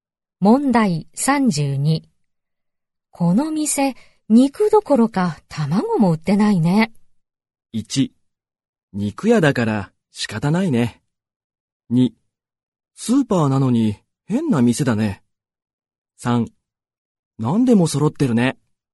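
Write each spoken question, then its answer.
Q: この店、肉どころか卵も売ってないね。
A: 2: スーパーなのに変な店だね。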